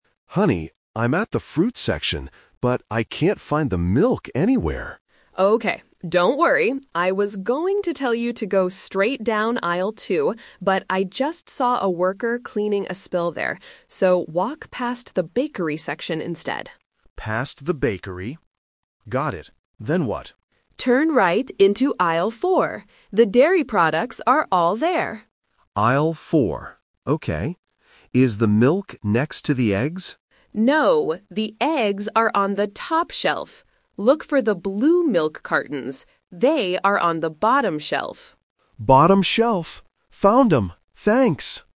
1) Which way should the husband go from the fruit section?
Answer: Past the bakery section.

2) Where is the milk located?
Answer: In Aisle 4.

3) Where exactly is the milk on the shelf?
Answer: On the bottom shelf.

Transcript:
Husband: Honey, I'm at the fruit section, but I can't find the milk anywhere.
Wife: Okay, don't worry. I was going to tell you to go straight down Aisle 2, but I just saw a worker cleaning a spill there. So, walk past the bakery section instead.
Husband: Past the bakery. Got it. Then what?
Wife: Turn right into Aisle 4. The dairy products are all there.
Husband: Aisle 4... Okay. Is the milk next to the eggs?
Wife: No, the eggs are on the top shelf. Look for the blue milk cartons. They are on the bottom shelf.